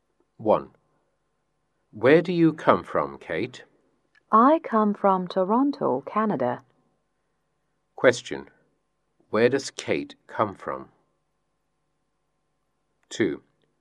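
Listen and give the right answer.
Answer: Toronto, Canada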